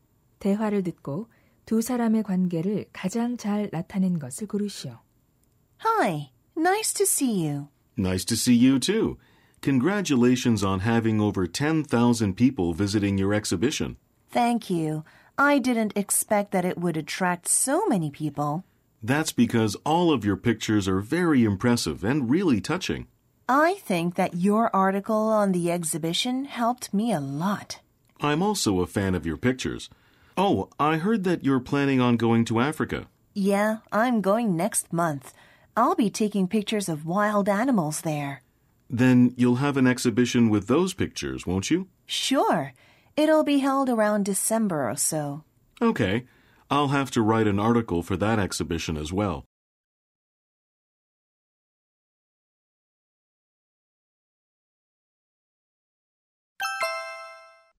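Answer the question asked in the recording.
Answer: 사진작가 — 기자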